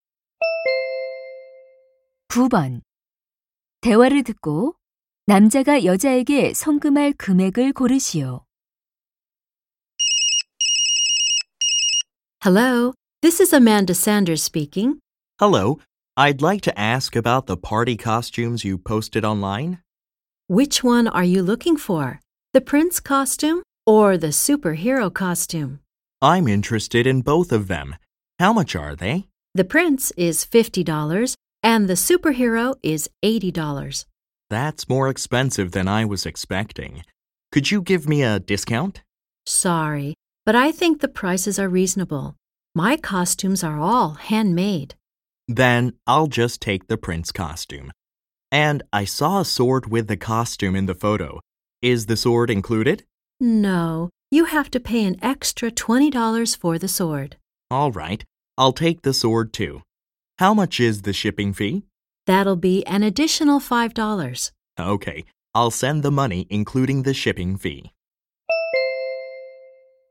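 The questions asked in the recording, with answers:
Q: 대화를 듣고 남자가 여자에게 송금할 금액을 고르시오.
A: $75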